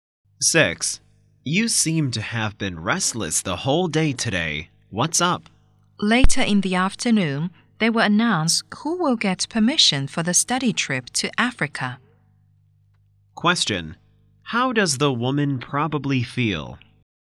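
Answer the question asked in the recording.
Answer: Anxious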